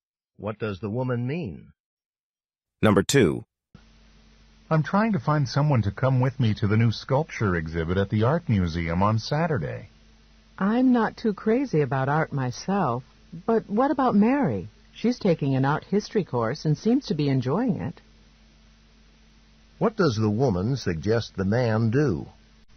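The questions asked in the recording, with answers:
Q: What does the woman suggest the man do?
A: Ask Mary to go to the exhibit with him.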